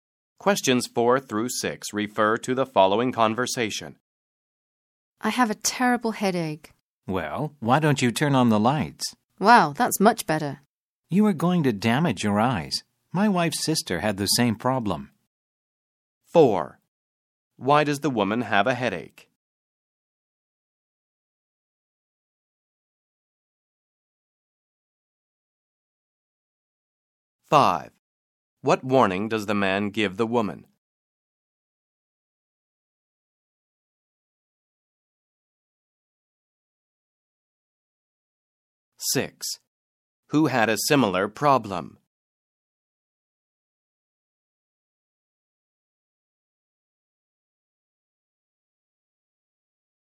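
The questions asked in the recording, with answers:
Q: What warning does the man give the woman?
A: She will damage her eyes

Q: Who had a similar problem?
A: His wife's sister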